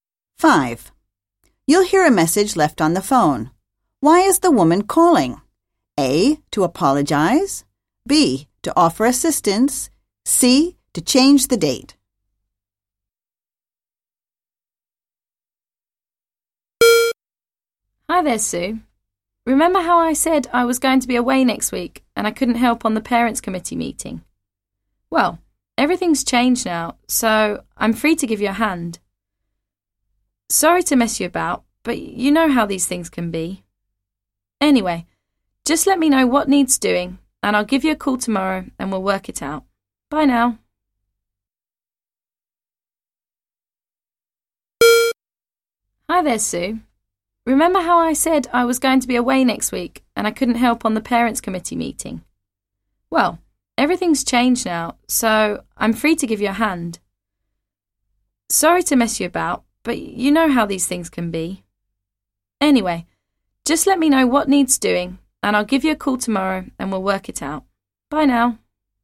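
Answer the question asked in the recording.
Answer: B: To offer assistance.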